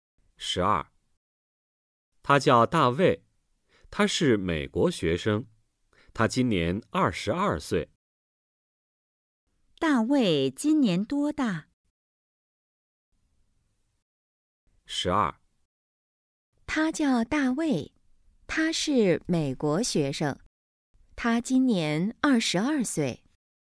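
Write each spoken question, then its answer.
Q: 大卫今年多大?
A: 二十二岁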